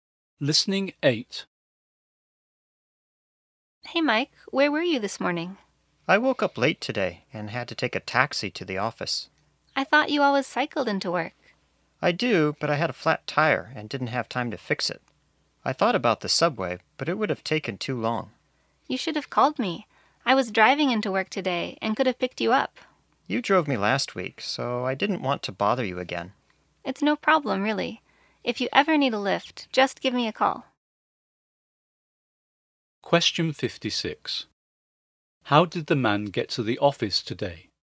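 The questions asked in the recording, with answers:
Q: How did the man get to the office today?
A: By taxi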